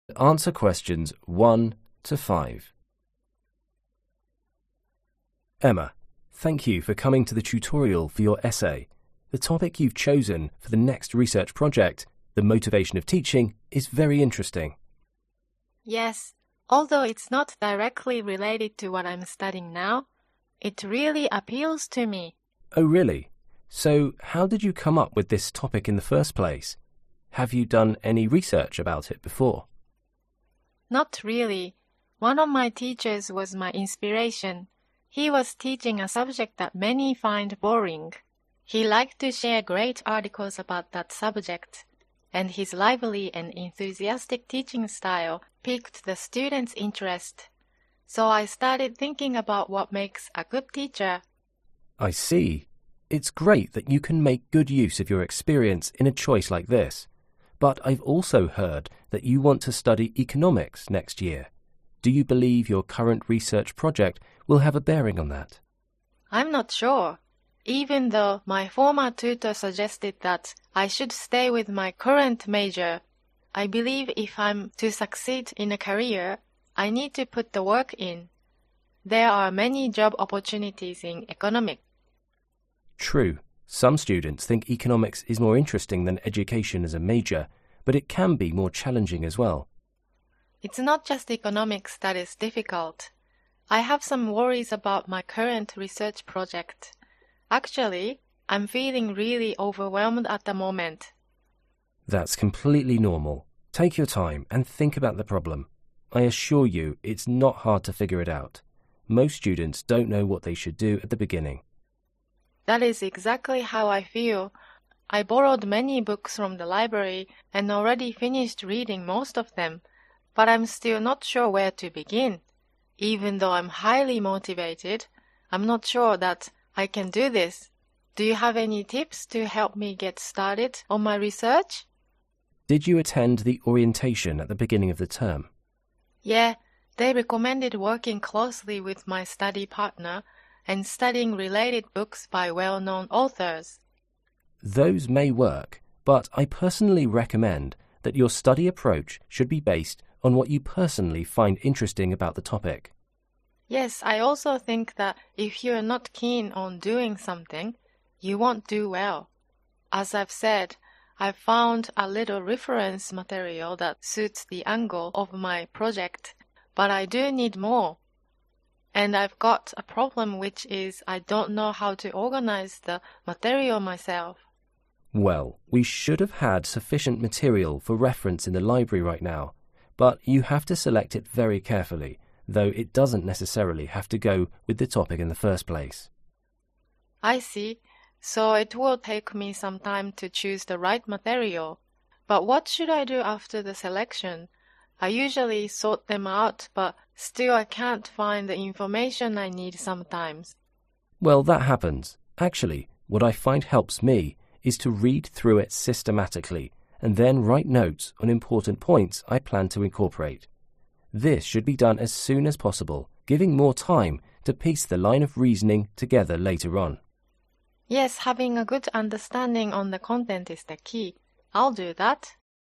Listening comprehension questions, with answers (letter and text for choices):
Choose the correct answer.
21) Emma first had the idea for the topic because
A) she had done research before.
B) she was interested in an article.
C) she was impressed by a teacher's class.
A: C) she was impressed by a teacher's class.

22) Emma wants to choose economics because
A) it is less difficult than education.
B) it will be useful for her future career.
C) she got some advice from her previous tutor.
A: B) it will be useful for her future career.

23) What is Emma worried about?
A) She needs more motivation.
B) She does not know what to do.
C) There is too much reading to do.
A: B) She does not know what to do.

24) What advice does the tutor give Emma about her research?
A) The learning method should be based on self-interest.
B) Emma should discuss the research with her partner.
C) Emma should read some books written by someone famous.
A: A) The learning method should be based on self-interest.

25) What does the tutor say about the reference material?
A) The notes for reference should be prepared early.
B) The reference material should match the topic first.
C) The available reference material is inadequate.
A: A) The notes for reference should be prepared early.